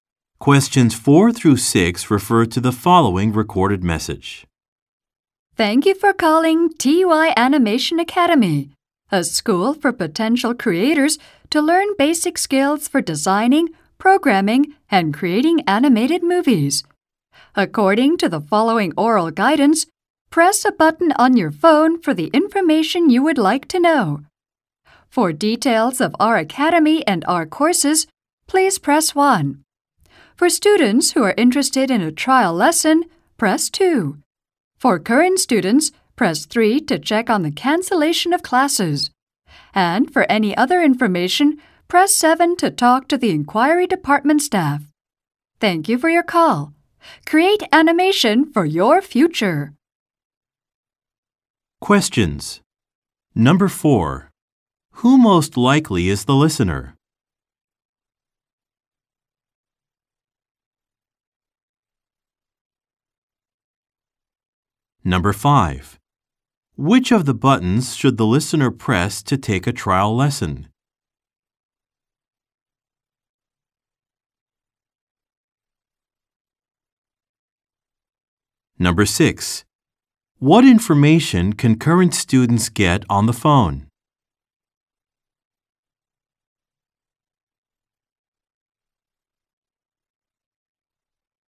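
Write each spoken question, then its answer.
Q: Which of the buttons should the listener press to take a trial lesson?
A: Button 2

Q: What information can current students get on the phone?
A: Whether classes are cancelled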